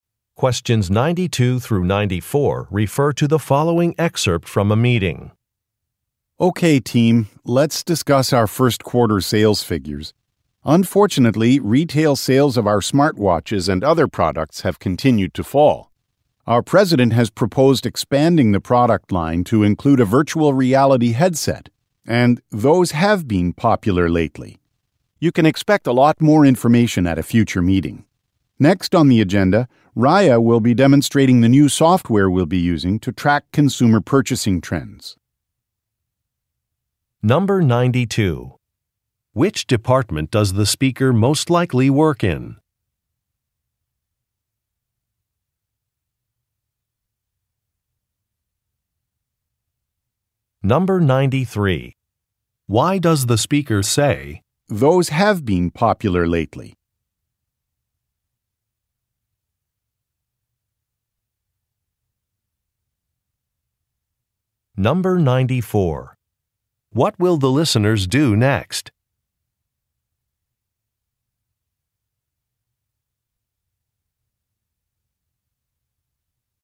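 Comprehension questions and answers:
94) What will the listeners do next?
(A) Take a lunch break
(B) Ask questions about a policy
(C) Read a report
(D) View a demonstration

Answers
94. D

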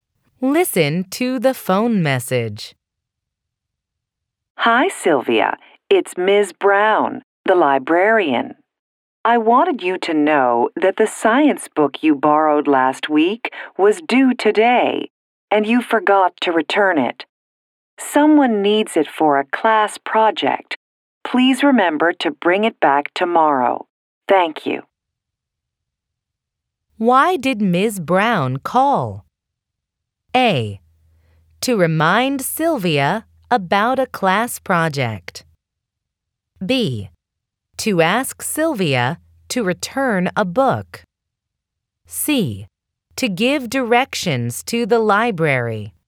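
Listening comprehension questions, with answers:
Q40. Why did Ms. Brown call?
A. To remind Sylvia about a class project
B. To ask Sylvia to return a book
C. To give directions to the library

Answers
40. B

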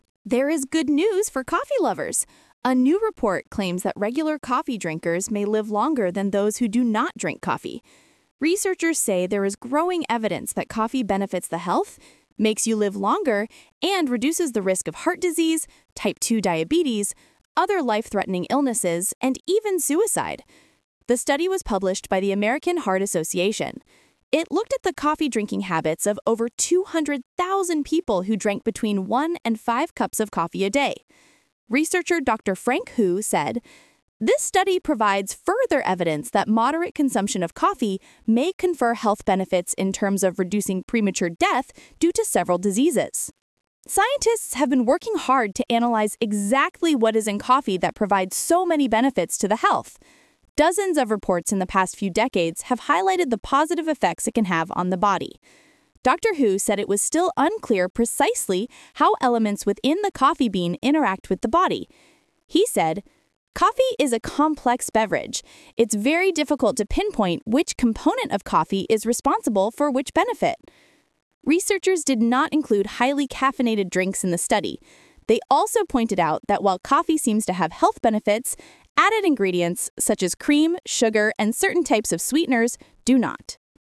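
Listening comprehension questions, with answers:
Talk/Lecture 3: Listen to a talk about the benefits of drinking coffee.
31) What type of diabetes can coffee reduce the risk of?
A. 1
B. 2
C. 3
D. 4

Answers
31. B

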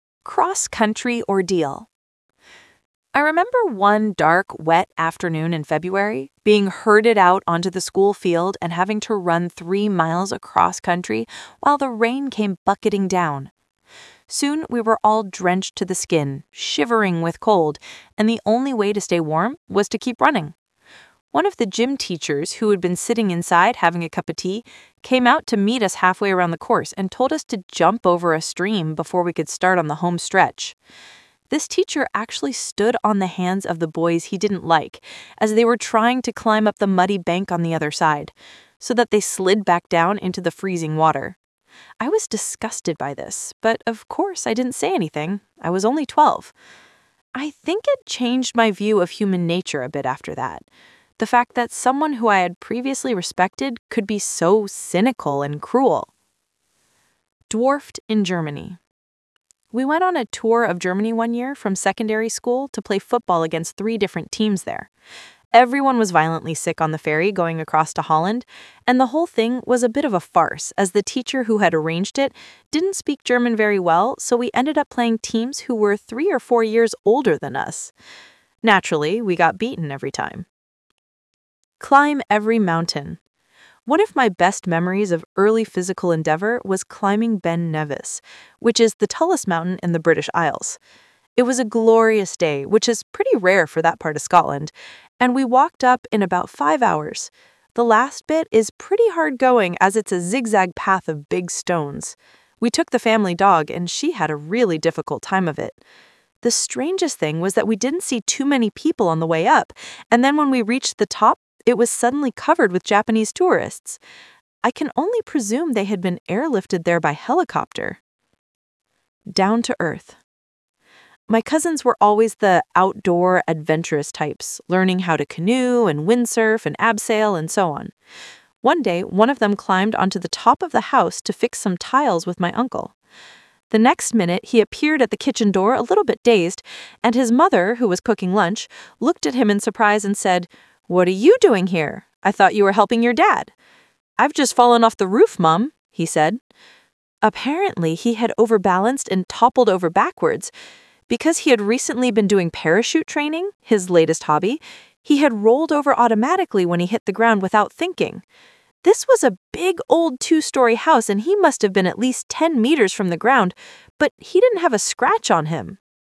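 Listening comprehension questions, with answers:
Talk/Lecture 2: You will hear people talking about their sport experience.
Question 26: Which sentence is not true about the cross-country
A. the teacher made the students run in the rain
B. the teacher ran the whole way with the students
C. the teacher made some of the boys fall into the stream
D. the teacher made one boy cry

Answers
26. B

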